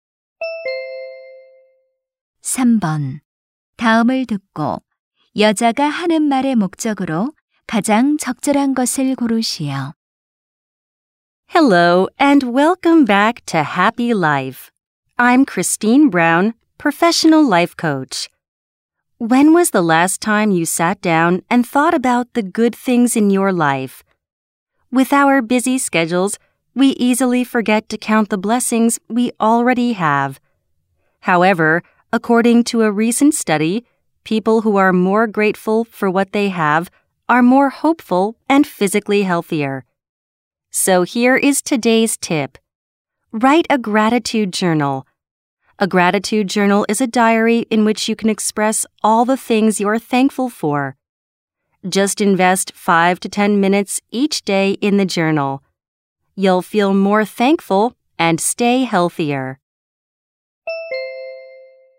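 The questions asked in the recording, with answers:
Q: 다음을 듣고 여자가 하는 말의 목적으로 가장 적절한 것을 고르시오.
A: 감사 일기 쓰기를 권장하려고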